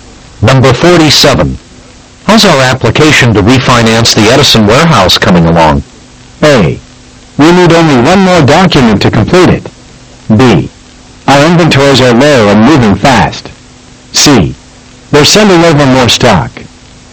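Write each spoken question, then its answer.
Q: How's our application to refinance the Edison warehouse coming along?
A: A: We need only one more document to complete it.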